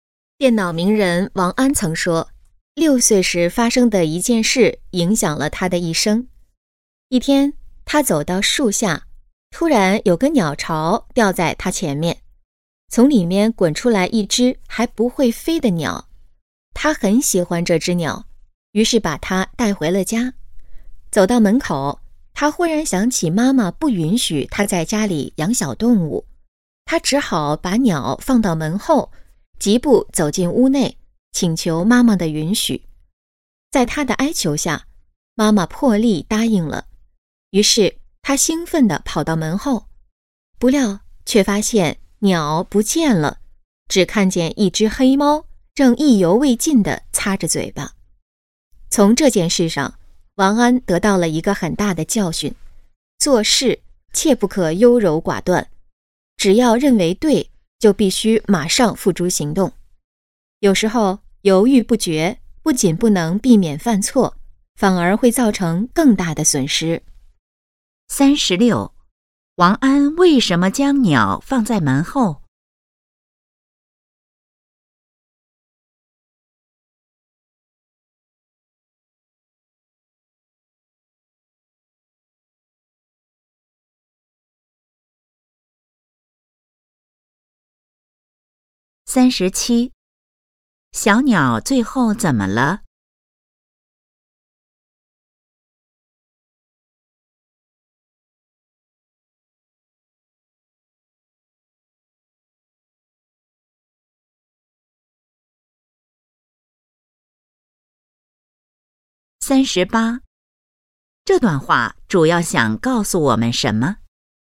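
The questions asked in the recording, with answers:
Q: 王安为什么将鸟放在门后?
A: 妈妈不允许他在家里养小动物

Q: 小鸟最后怎么了?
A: 被黑猫吃了

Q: 这段话主要想告诉我们什么?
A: 做事不可优柔寡断,认为对就马上行动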